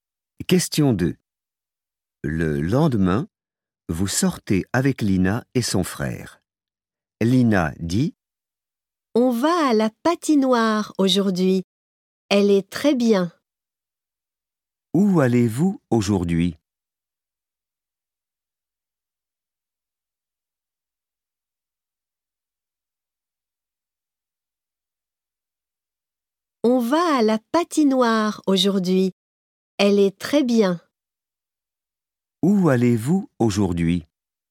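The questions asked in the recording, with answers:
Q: Où allez-vous aujourd'hui?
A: à la patinoire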